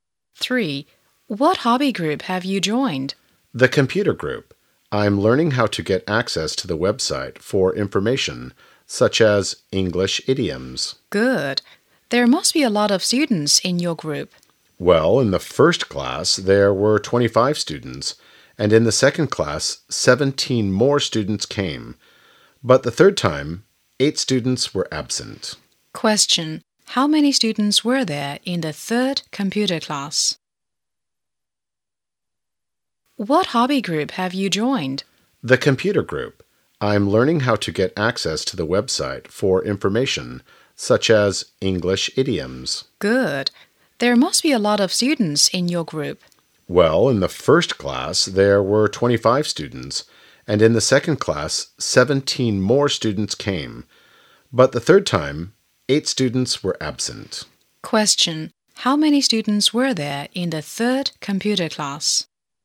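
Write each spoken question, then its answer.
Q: How many students were there in the third computer class?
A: 34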